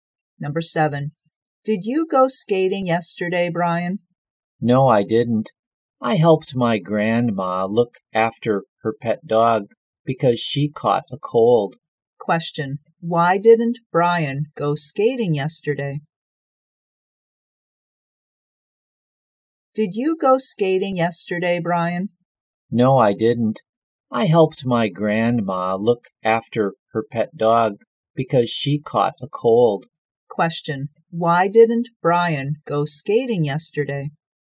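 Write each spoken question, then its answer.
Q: Why didn't Brian go skating yesterday?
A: He helped his grandma look after her pet dog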